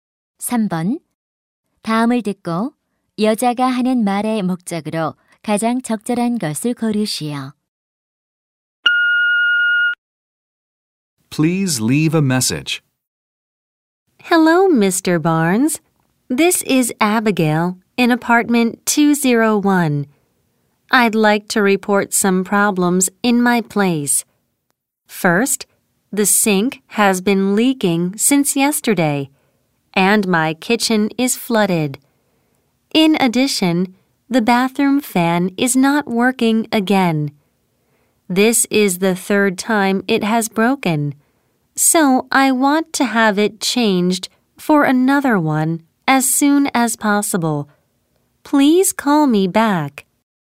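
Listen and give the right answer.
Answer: 집의 고장(싱크대 누수, 욕실 환풍기)을 신고하고 수리·교체를 요청하려고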